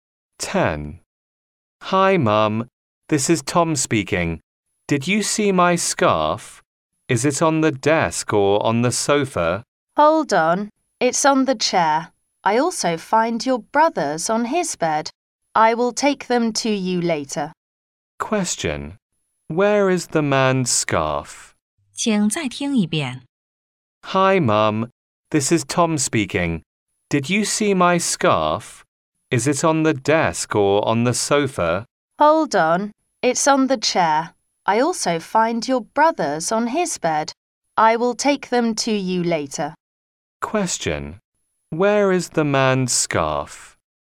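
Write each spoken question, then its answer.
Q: Where is the man's scarf?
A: On the chair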